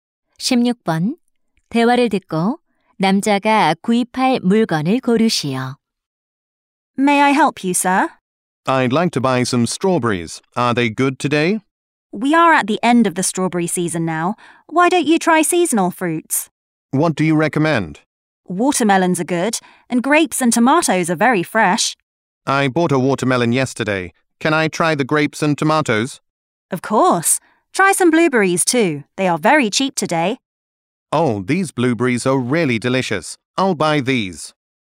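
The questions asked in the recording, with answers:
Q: 대화를 듣고 남자가 구입할 물건을 고르시오.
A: 블루베리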